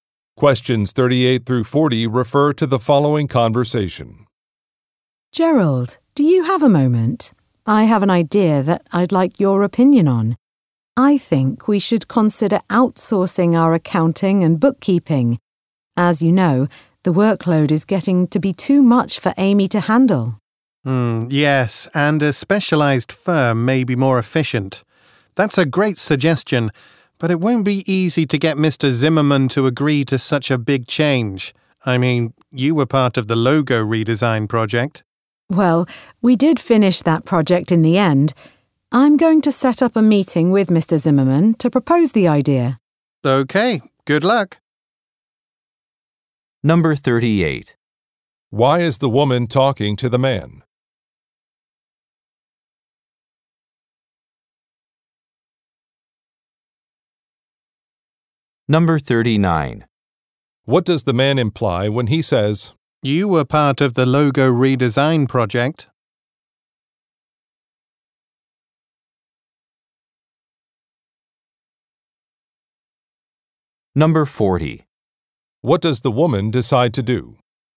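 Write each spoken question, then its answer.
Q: Why is the woman talking to the man?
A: To get his opinion on an idea to outsource accounting and bookkeeping

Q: What does the woman decide to do?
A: Set up a meeting with Mr. Zimmerman to propose the idea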